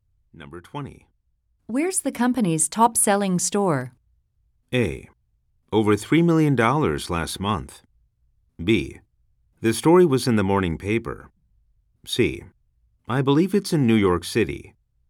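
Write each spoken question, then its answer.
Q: Where's the company's top-selling store?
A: C: I believe it's in New York City.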